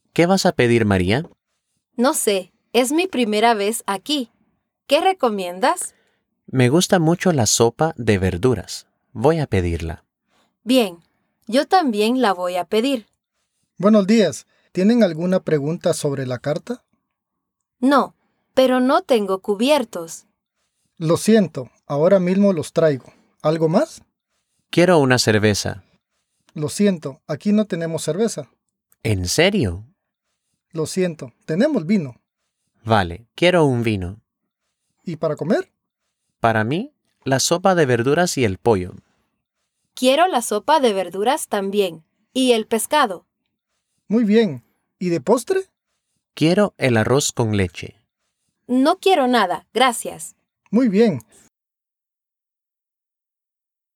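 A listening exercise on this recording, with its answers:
Escucha el corte y contesta las preguntas usando los DOP:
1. ¿Quiere Juan la sopa?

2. ¿Necesita María los cubiertos?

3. ¿Sirve el restaurante cerveza?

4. ¿Pide Juan el pollo?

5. ¿Pide María el postre?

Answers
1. la quiere
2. los necesita
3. no la sirve
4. lo pide
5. no lo pide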